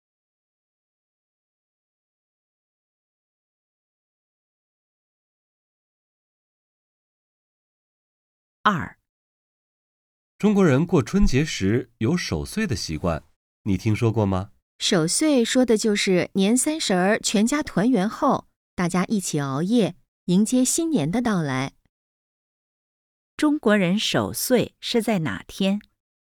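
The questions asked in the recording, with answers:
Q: 中国人守岁是在哪天?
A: 年三十儿(除夕)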